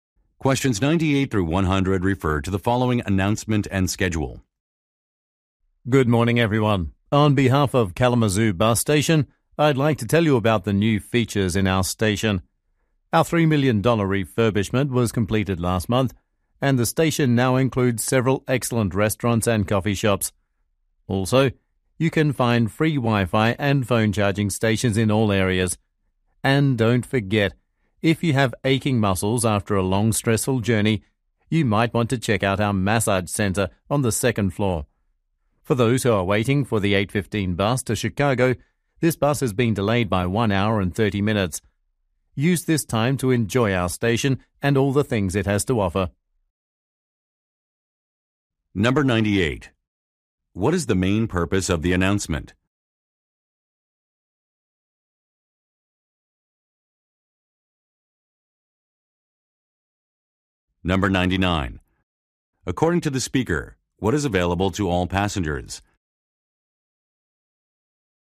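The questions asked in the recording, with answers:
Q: What is the main purpose of the announcement?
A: To describe the station's new features

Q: According to the speaker, what is available to all passengers?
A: Free Wi-Fi and phone charging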